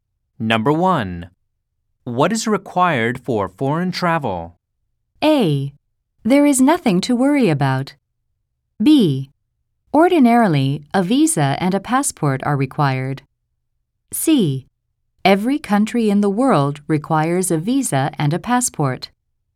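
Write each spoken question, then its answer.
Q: What is required for foreign travel?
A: B: Ordinarily, a visa and a passport are required.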